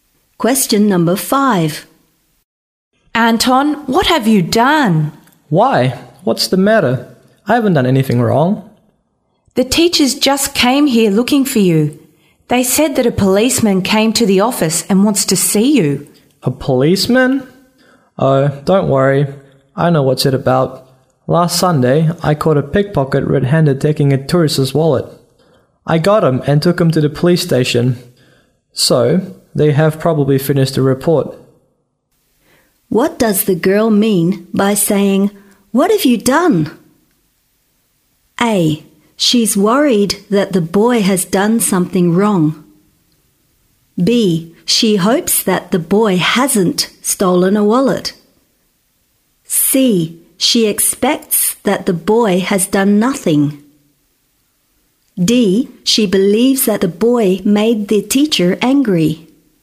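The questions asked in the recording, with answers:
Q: What does the girl mean by saying, "What have you done?"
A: A: She's worried that the boy has done something wrong.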